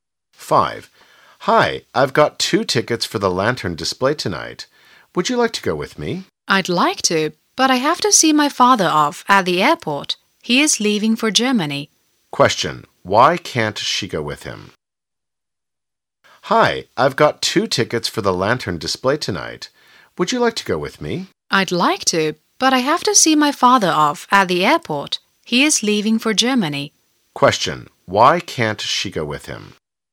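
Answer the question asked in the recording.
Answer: She has to see her father off at the airport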